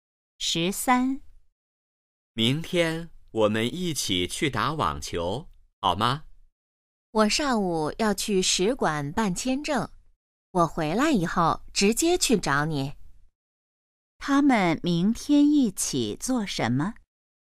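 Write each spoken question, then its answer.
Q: 他们明天一起做什么?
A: 打网球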